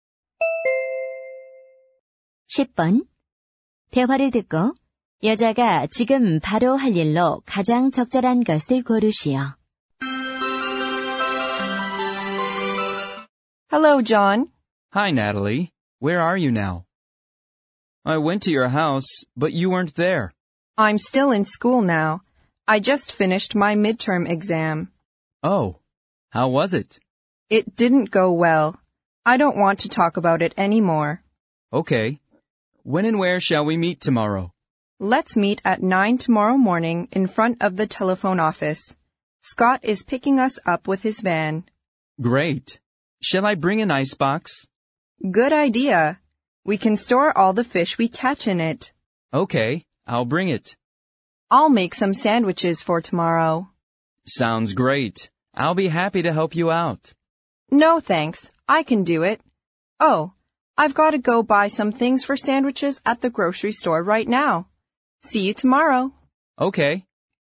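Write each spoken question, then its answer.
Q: 대화를 듣고 여자가 지금 바로 할 일로 가장 적절한 것을 고르시오.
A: 식료품점에서 샌드위치 재료 사기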